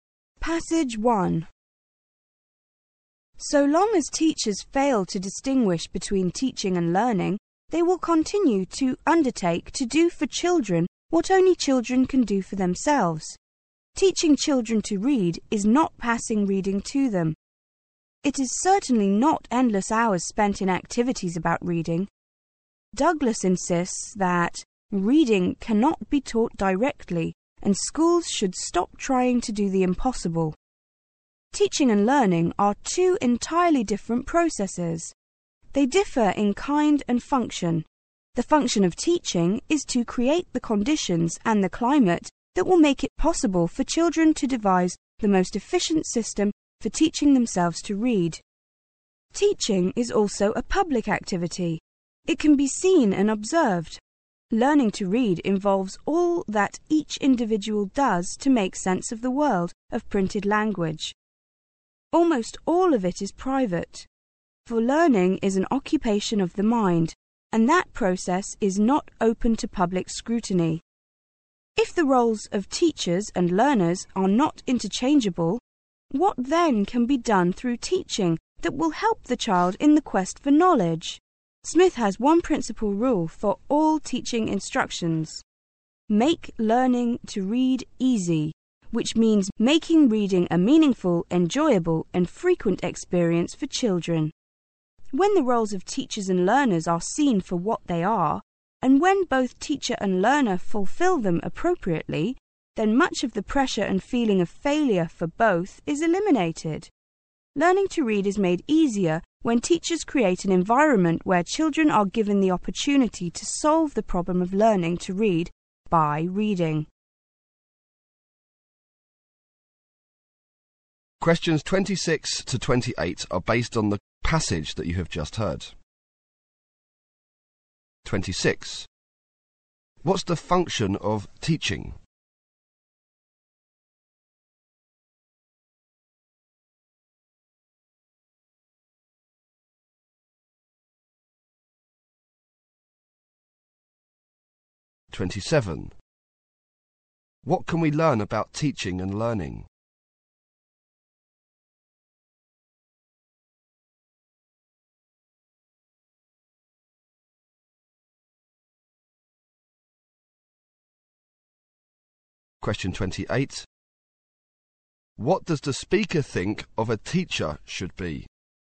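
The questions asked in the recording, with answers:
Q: What's the function of teaching?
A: To create the conditions and climate in which children can teach themselves to read

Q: What can we learn about teaching and learning?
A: They are entirely different processes that differ in kind and function.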